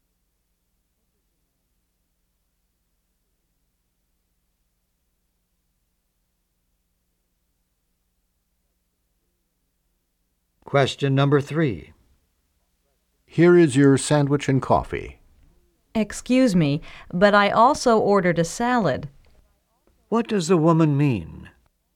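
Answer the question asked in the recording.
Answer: Her salad is missing from the order.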